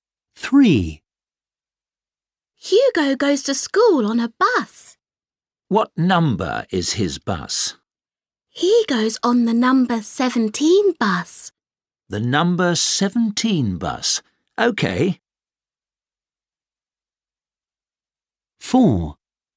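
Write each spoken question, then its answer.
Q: What number is his bus?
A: 17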